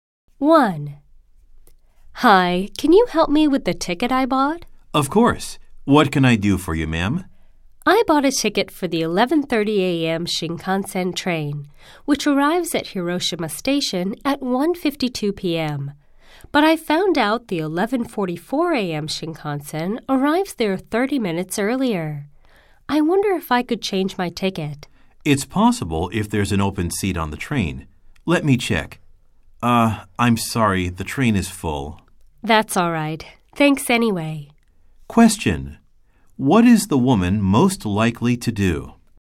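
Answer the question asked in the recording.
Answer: Keep her ticket and take the 11:30 a.m. train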